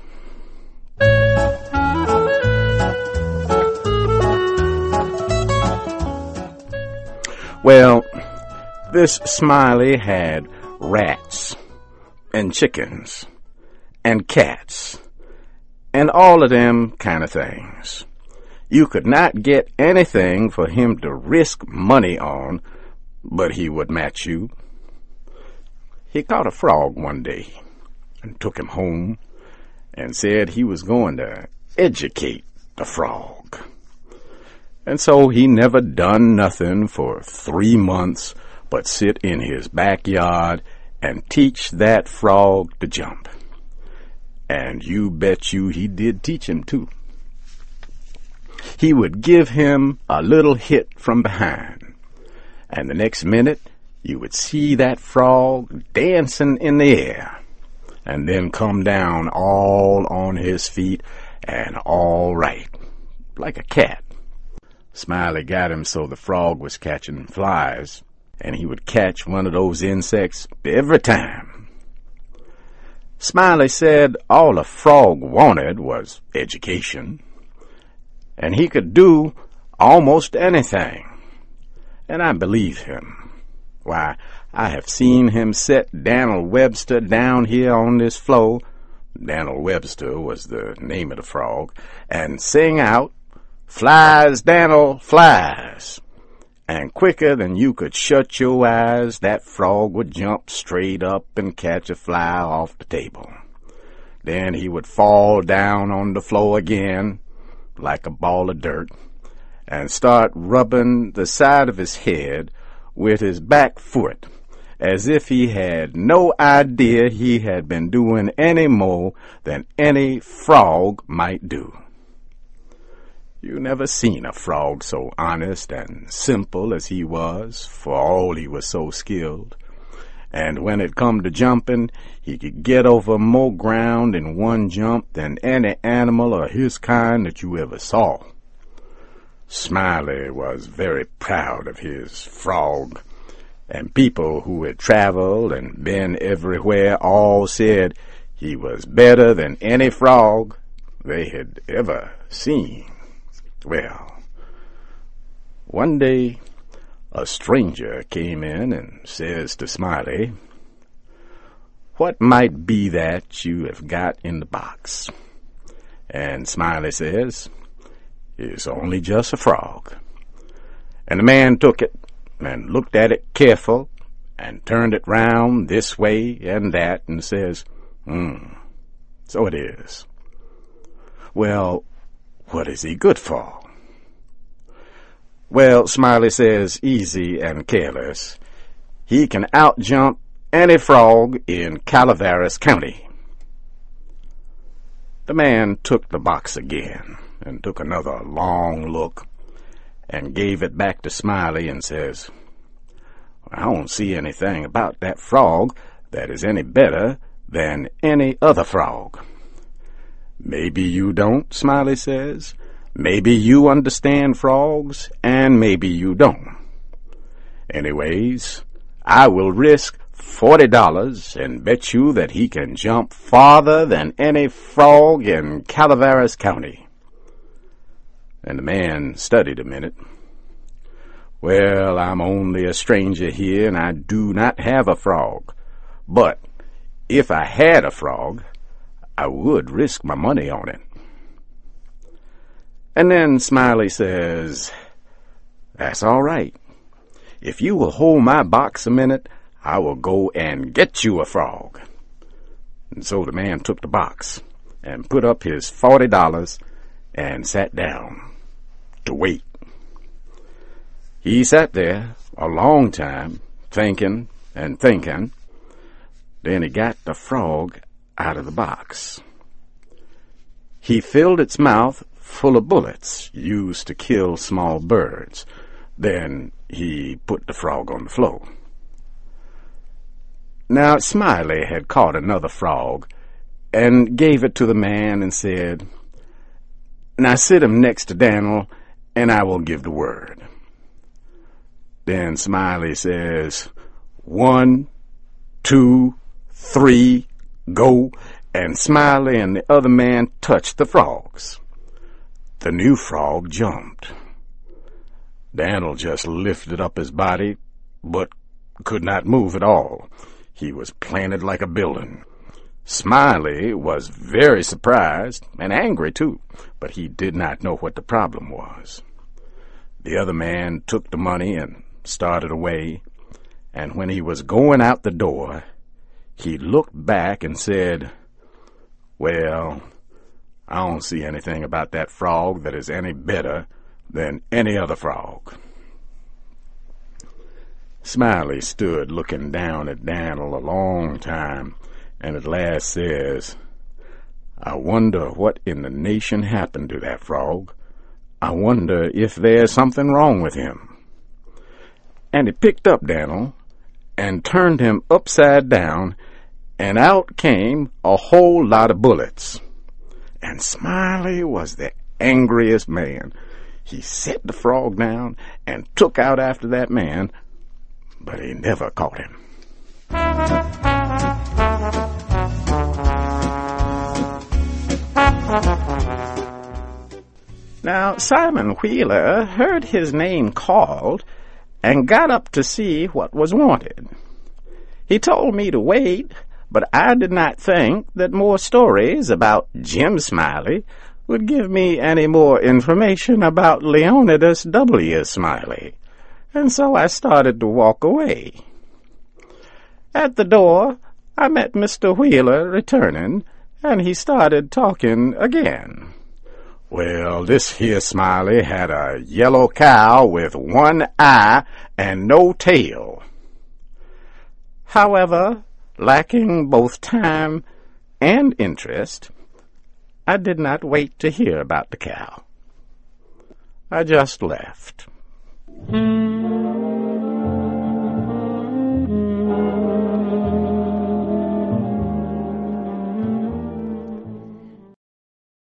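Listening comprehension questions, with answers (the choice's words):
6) Aside from jumping, what skill does Jim teach his frog?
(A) Swimming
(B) Catching flies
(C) Singing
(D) Flying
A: Catching flies

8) Dan'l Webster was the name of the...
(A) Dog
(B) Frog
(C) Cow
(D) Fly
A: Frog

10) What does the stranger do to Jim's frog?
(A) Cuts the backs of his legs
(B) Fills him with bullets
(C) Gives him a heart attack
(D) Feeds him to a lizard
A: Fills him with bullets

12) Other than his eye, what was Jim's one-eyed cow missing?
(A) Its tail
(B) One of its stomachs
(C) Its front teeth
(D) One of its ears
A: Its tail

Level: CAE - Certificate in Advanced English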